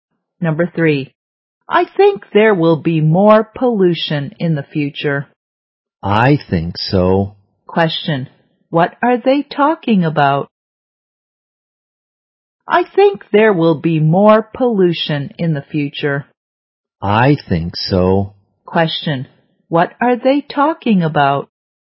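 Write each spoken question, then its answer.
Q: what are they talking about?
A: Pollution in the future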